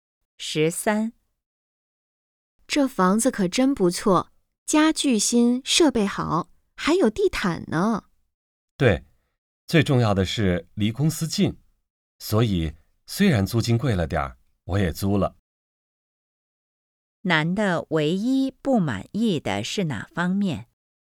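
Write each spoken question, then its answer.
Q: 男的唯一不满意的是哪方面?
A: 租金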